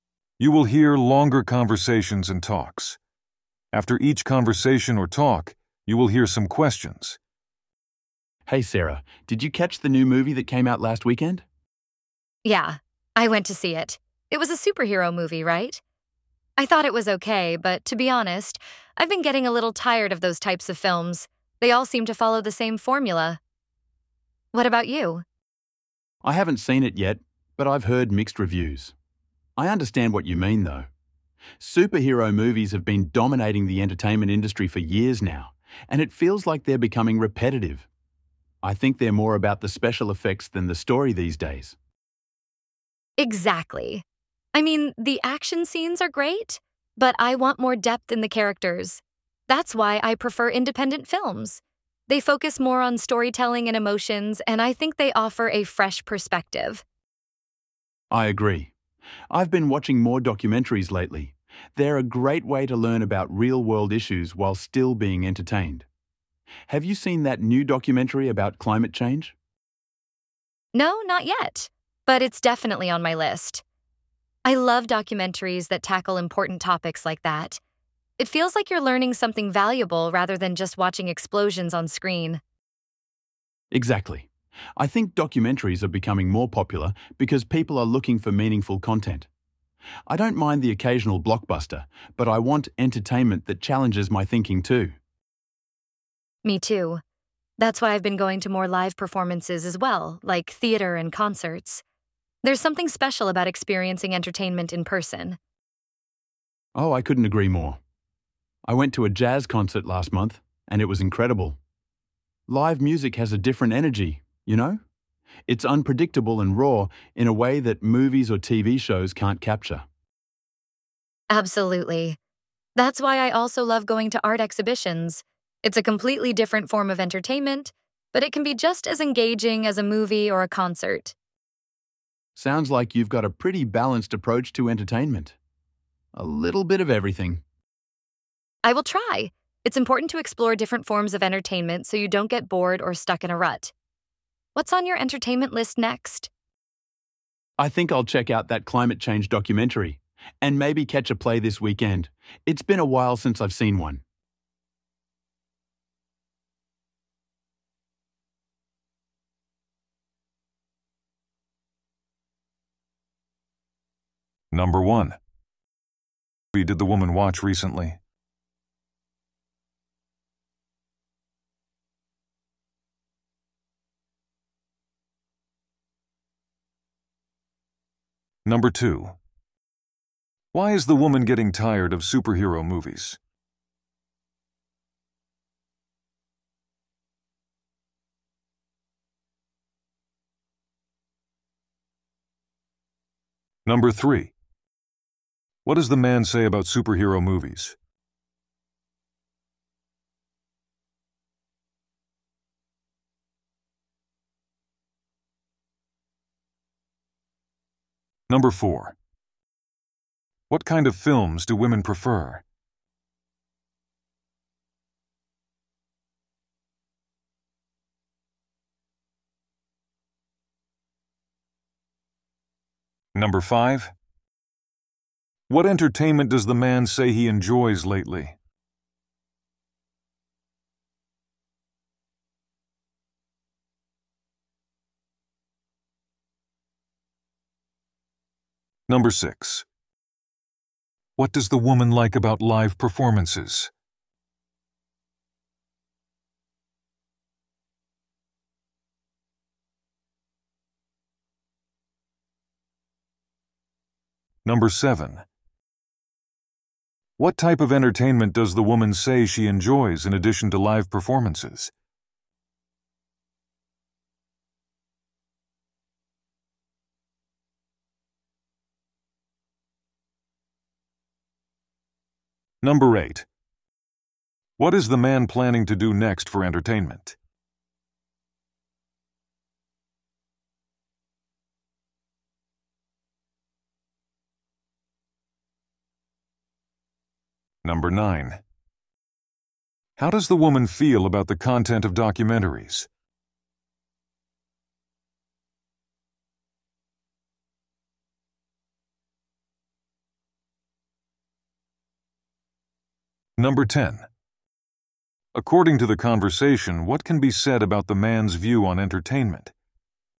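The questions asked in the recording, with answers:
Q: What movie did the woman watch recently?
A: A superhero movie

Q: Why is the woman getting tired of superhero movies?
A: They all seem to follow the same formula

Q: What does the man say about superhero movies?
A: They are becoming repetitive and focus more on special effects than story

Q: What kind of films do women prefer?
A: Independent films

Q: What entertainment does the man say he enjoys lately?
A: Documentaries

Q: What type of entertainment does the woman say she enjoys in addition to live performances?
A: Art exhibitions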